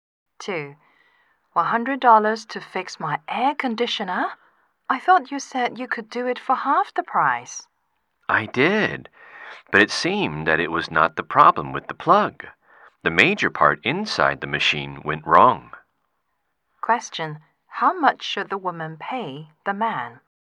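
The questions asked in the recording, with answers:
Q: how much should the woman pay the man?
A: $100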